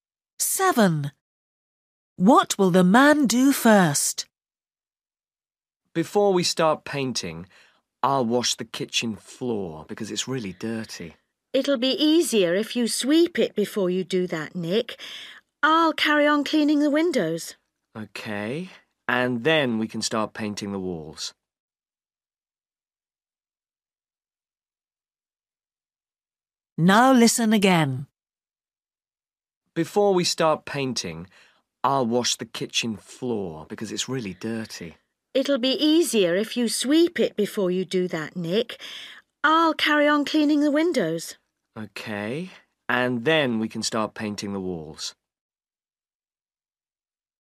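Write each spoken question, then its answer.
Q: What will the man do first?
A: sweep the kitchen floor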